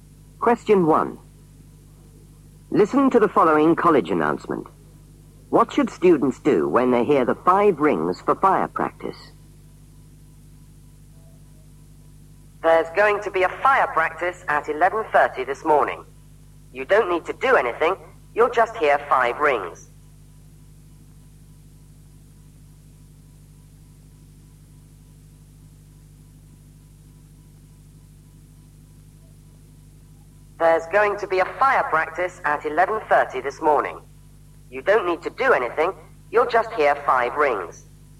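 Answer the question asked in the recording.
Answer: Nothing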